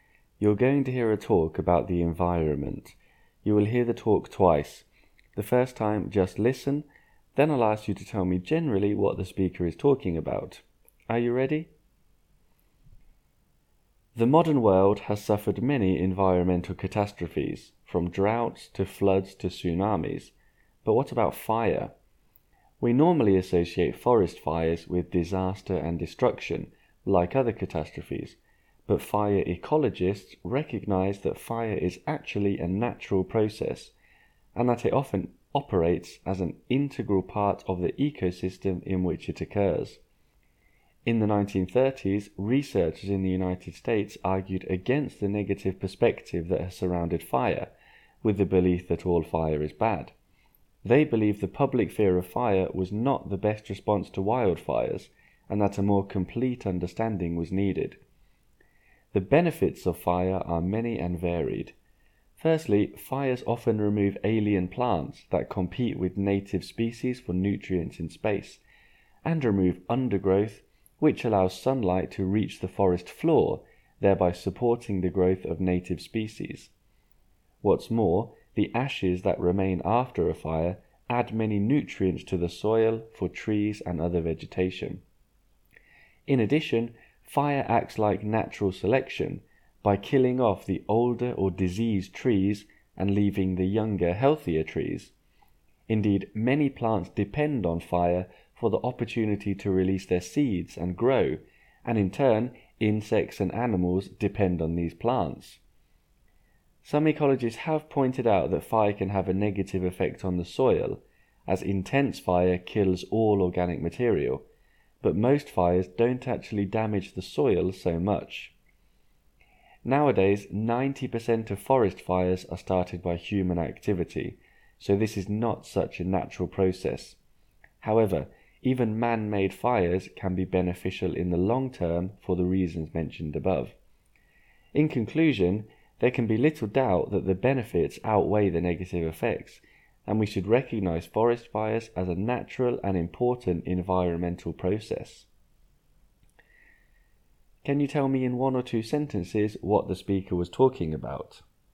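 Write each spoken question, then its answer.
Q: Can you tell me in one or two sentences what the speaker was talking about?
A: Forest fires are a natural, important environmental process whose benefits outweigh their negative effects.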